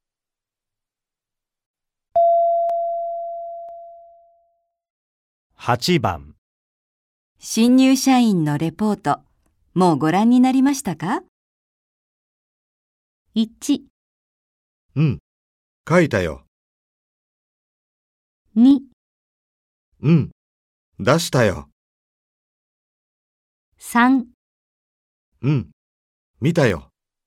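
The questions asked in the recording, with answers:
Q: 新入社員のレポート、もうご覧になりましたか?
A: 3: うん、見たよ。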